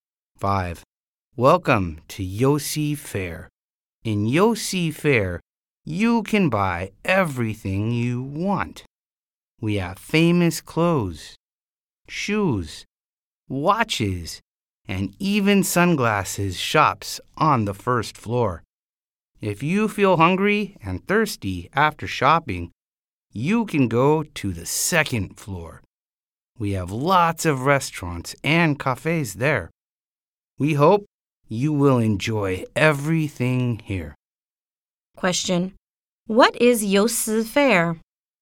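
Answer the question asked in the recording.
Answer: A shopping mall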